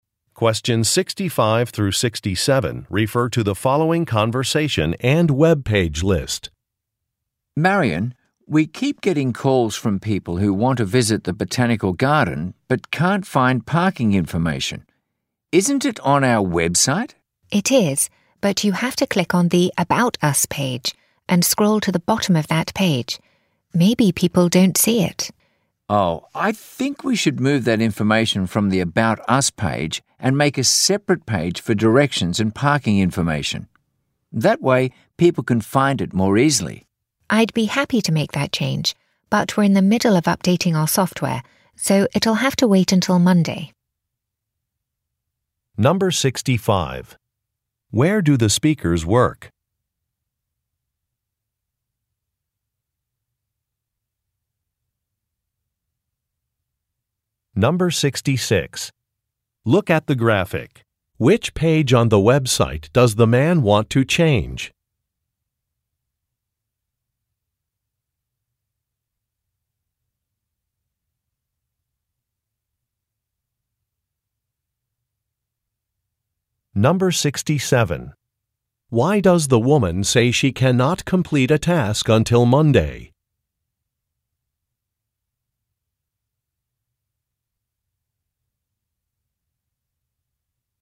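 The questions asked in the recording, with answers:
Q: Where do the speakers work?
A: At a botanical garden

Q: Why does the woman say she cannot complete a task until Monday?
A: Their software is being updated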